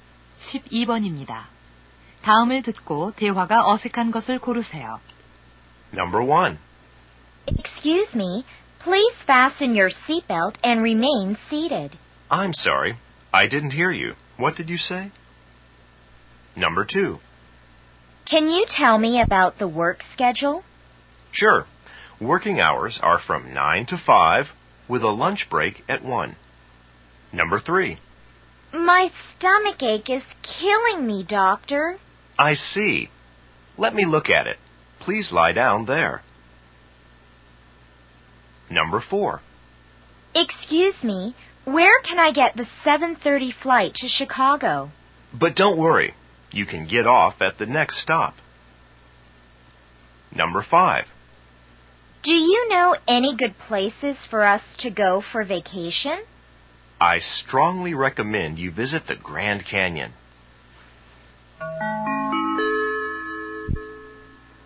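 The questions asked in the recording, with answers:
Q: 다음을 듣고 대화가 어색한 것을 고르세요.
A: 4: Excuse me, where can I get the 7:30 flight to Chicago? / But don't worry. You can get off at the next stop.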